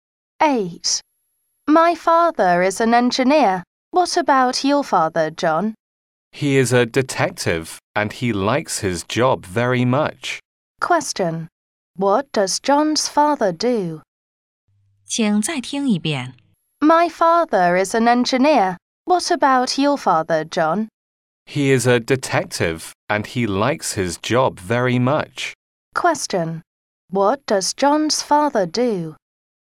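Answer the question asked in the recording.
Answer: He is a detective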